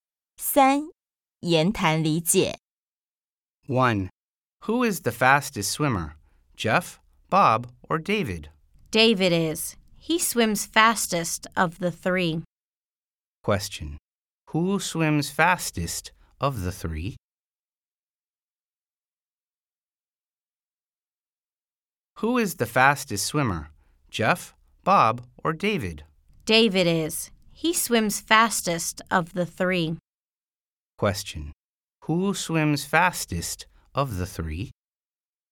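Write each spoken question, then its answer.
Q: Who swims fastest of the three?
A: David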